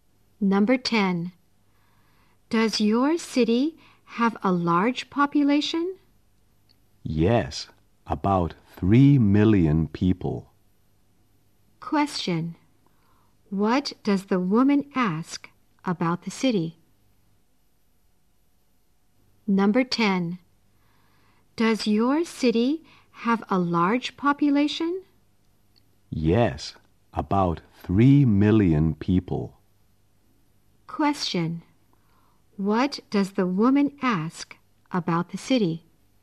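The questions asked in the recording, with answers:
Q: Question. What does the woman ask about the city?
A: Whether it has a large population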